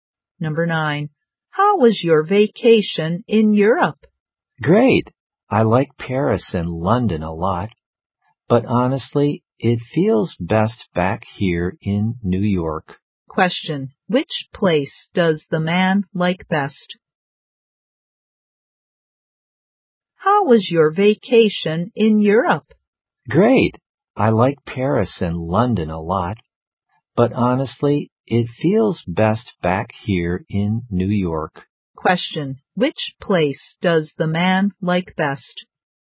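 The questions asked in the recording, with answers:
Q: Which place does the man like best?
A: New York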